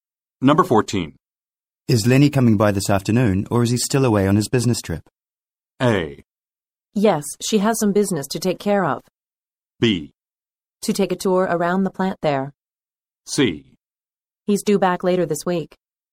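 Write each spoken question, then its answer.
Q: Is Lenny coming by this afternoon, or is he still away on his business trip?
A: C: He's due back later this week.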